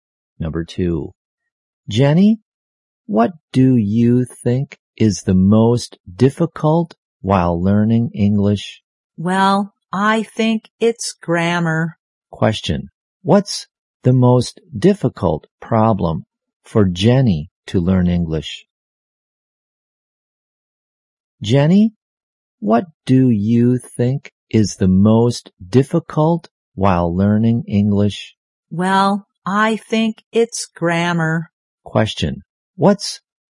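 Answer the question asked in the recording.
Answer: Grammar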